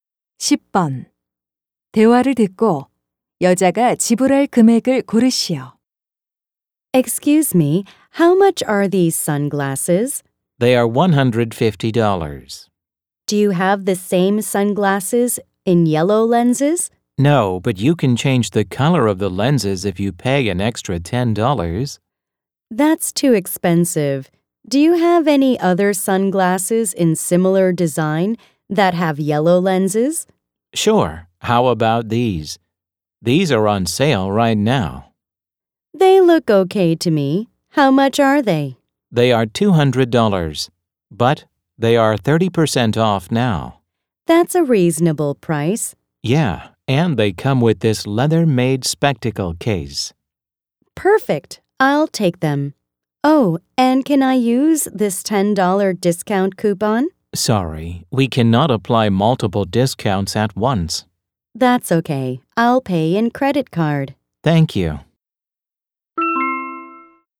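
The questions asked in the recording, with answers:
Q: 대화를 듣고 여자가 지불할 금액을 고르시오.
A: 140달러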